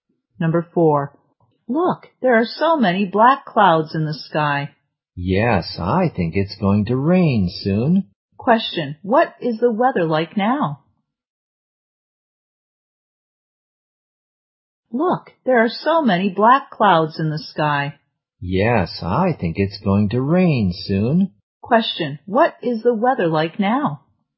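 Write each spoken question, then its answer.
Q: what is the weather like now?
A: Cloudy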